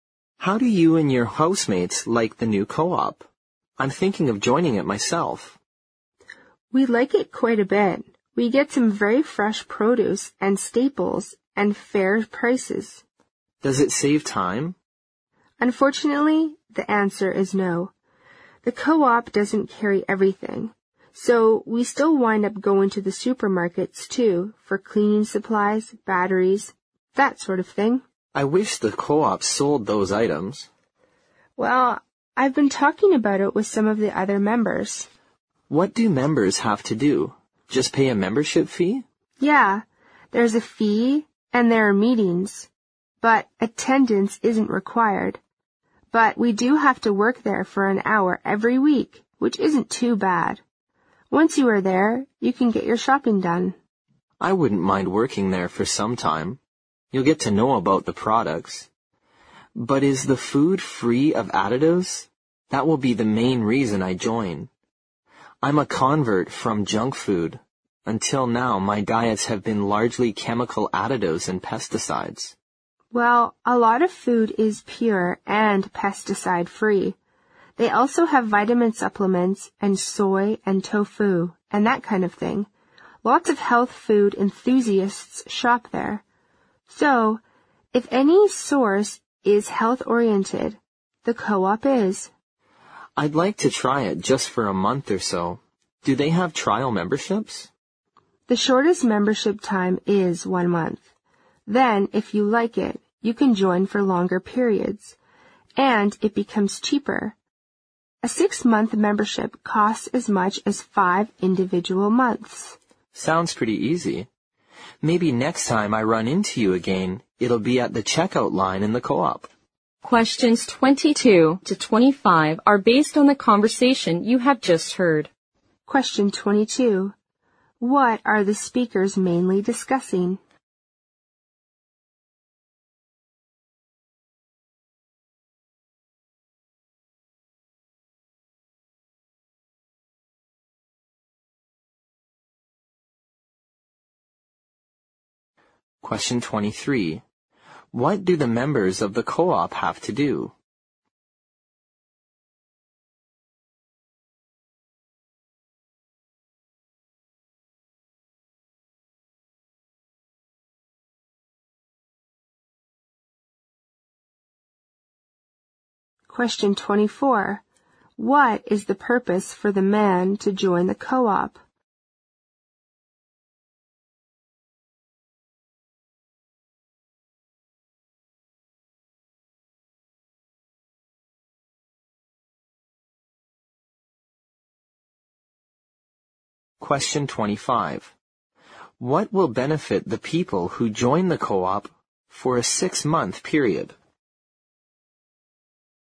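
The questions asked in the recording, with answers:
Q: What are the speakers mainly discussing?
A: A food co-op the man is thinking of joining

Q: What do the members of the co-op have to do?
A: Pay a membership fee and work there an hour every week

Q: What is the purpose for the man to join the co-op?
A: To get food free of additives (healthier food)

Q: What will benefit the people who join the co-op for a 6-month period?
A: It costs less: 6 months for the price of 5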